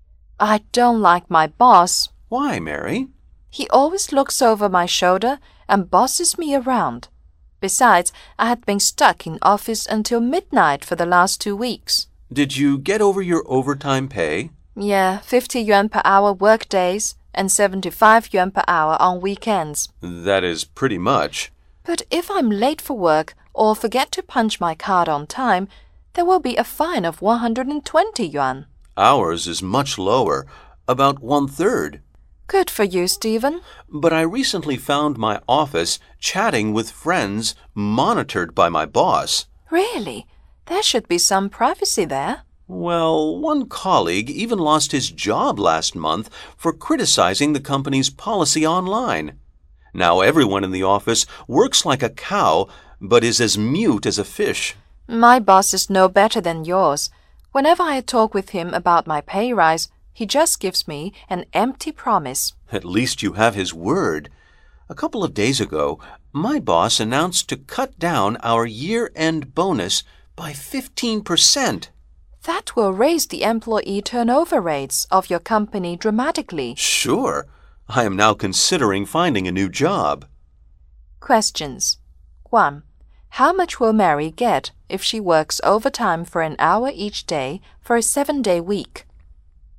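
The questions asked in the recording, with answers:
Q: How much will Mary get if she works overtime for 1 hour each day for a 7-day week?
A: 400 yuan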